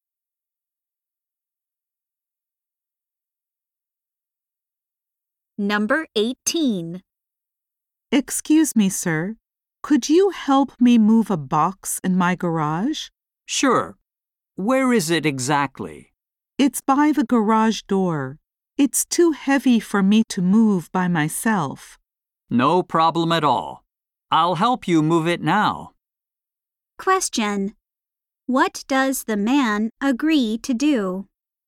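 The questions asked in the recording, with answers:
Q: What does the man agree to do?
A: Help move a heavy box in the garage.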